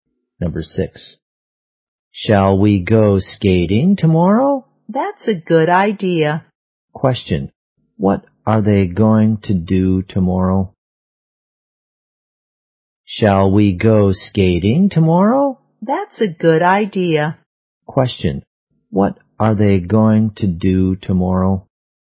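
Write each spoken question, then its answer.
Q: What are they going to do tomorrow?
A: Go skating.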